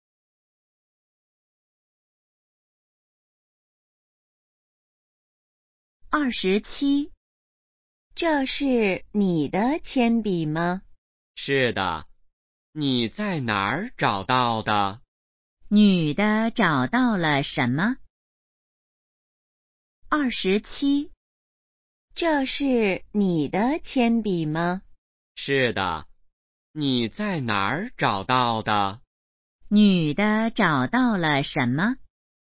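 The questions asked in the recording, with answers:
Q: 女的找到了什么?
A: 铅笔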